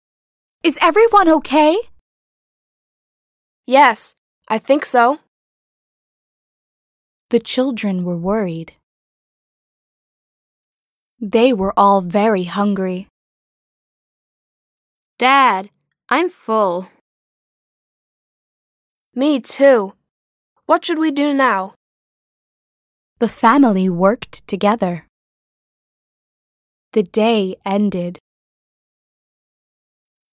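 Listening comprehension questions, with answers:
«باتوجه به فایل صوتی جمله ها را مرتب کنید»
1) Is everyone OK?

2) Yes, I think so.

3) The children were worried.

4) They were all very hungry.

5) Dad, I'm full.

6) Me, too. What should we do now?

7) The family worked together.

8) The day ended.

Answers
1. 1
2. 2
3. 3
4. 4
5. 5
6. 6
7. 7
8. 8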